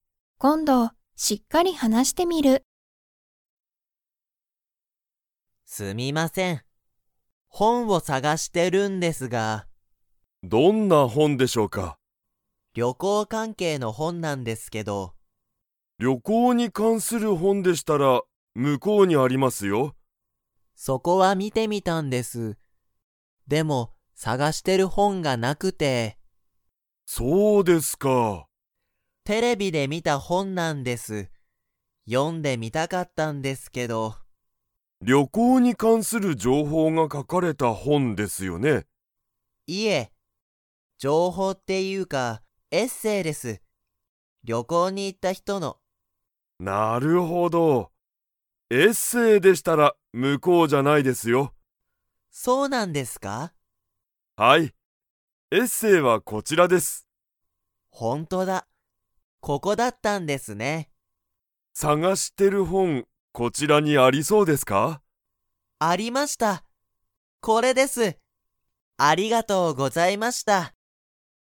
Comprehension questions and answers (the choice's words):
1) 加藤かとうさんは何なにに関かんする本ほんを探さがしていますか?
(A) 料理りょうり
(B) 情報じょうほう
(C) 旅行りょこう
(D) テレビ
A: 旅行りょこう

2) 加藤かとうさんが探さがしている本ほんは 。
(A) あった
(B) なかった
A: あった

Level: Level 3